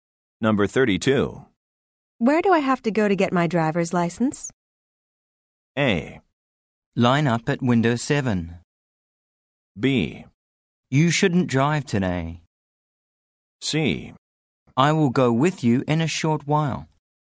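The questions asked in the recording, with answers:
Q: Where do I have to go to get my driver's license?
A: A: Line up at window 7.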